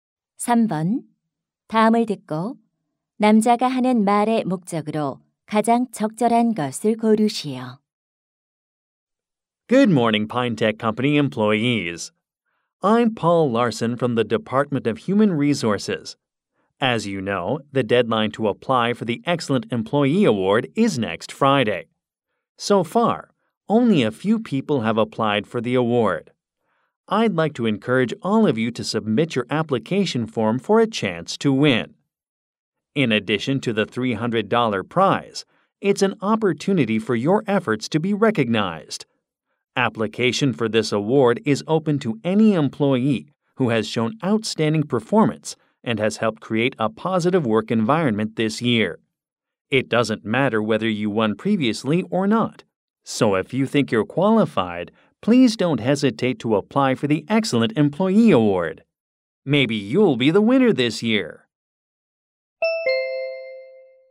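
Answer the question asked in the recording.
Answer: 우수 직원상에 지원하도록 독려하려고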